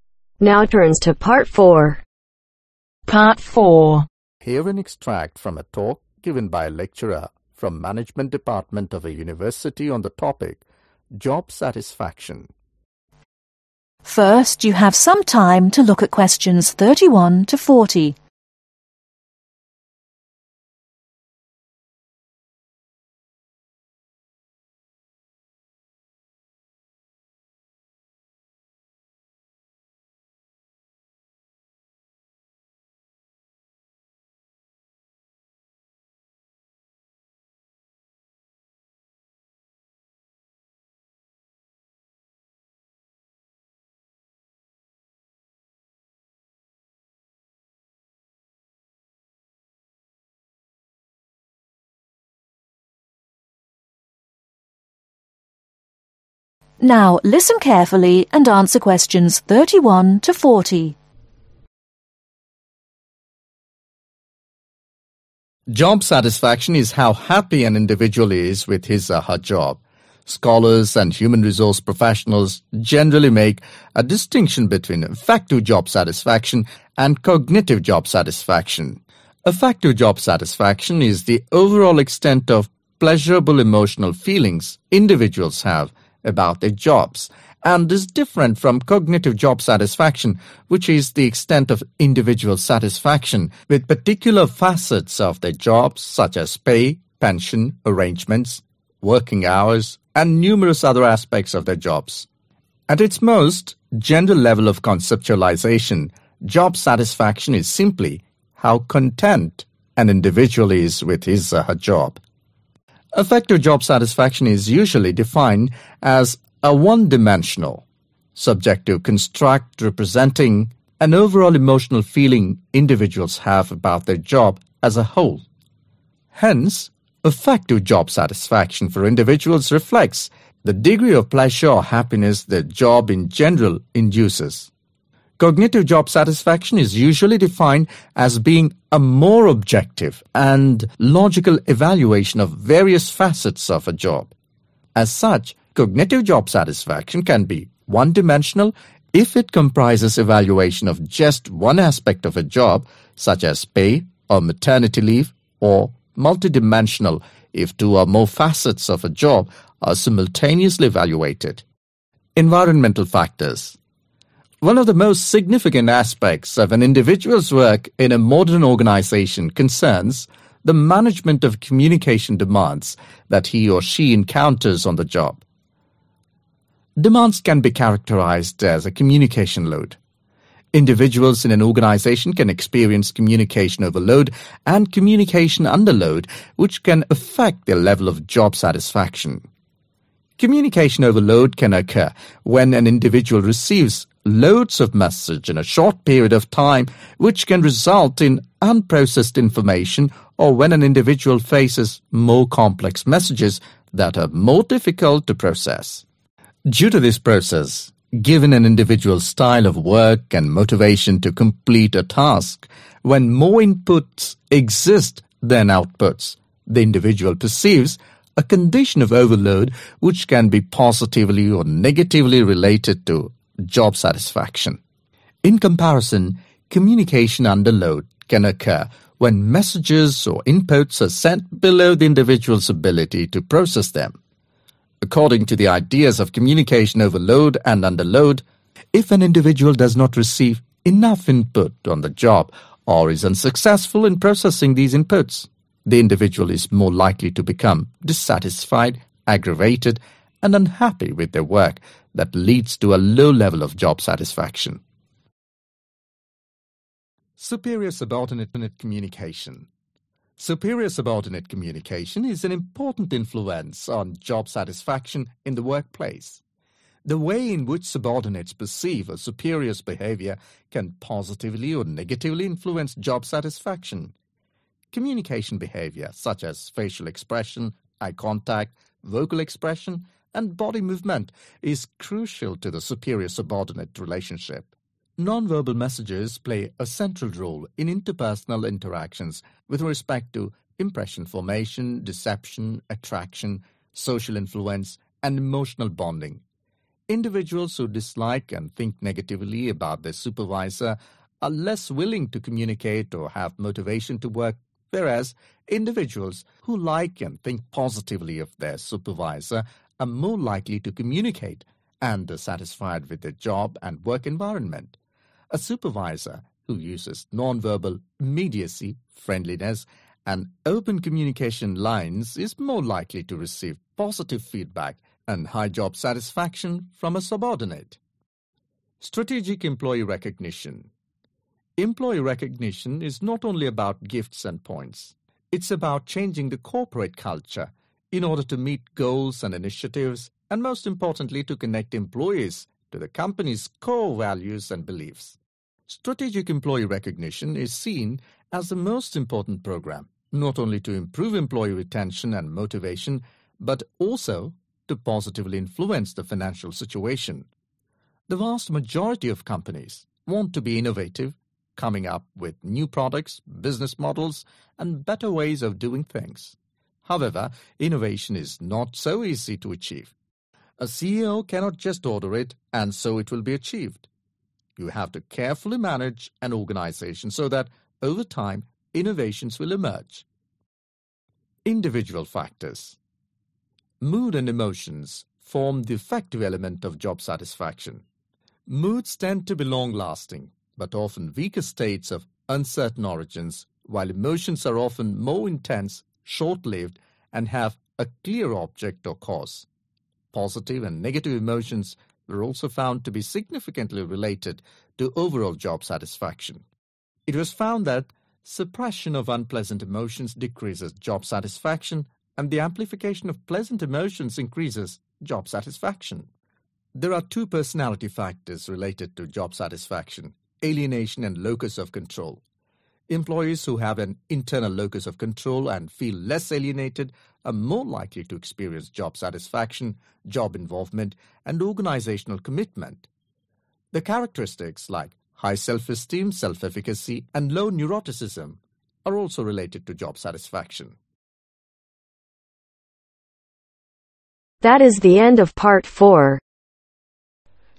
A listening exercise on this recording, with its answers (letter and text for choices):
Choose the correct letter A , B or C.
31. Educated people differentiate between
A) Affective and cognitive job Satisfaction.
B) Mental and emotional job satisfaction.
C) Intellectual and physical job Satisfaction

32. General job Satisfaction means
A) Depressed.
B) Unhappy.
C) Content.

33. Affective job Satisfaction for a particular person means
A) Leadership.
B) Comfort and Pleasure.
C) Achievements.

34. What can be one dimensional if it comprises evaluation of only one aspect of job.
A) Affective job satisfaction.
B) Cognitive job satisfaction.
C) Emotional job satisfaction.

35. Demand is characterized as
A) Communication Load.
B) Non Imparting.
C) No Message.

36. Individual unhappiness caused due to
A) Communication with no ideas.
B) Communication with no out put.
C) Not having enough input on job.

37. Communication between a superior and a subordinate has vital effect on job satisfaction ............ .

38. Gestural messages play a non vital role ............ .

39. Strategic employee recognition gives a positive impact to the financial situation ............ .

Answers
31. A) Affective and cognitive job Satisfaction.
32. C) Content.
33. B) Comfort and Pleasure.
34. B) Cognitive job satisfaction.
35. A) Communication Load.
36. C) Not having enough input on job.
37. Yes
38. No
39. Yes